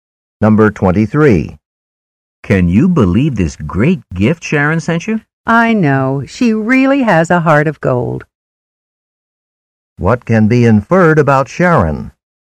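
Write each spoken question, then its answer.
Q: What can be inferred about Sharon?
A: She is very generous and kind.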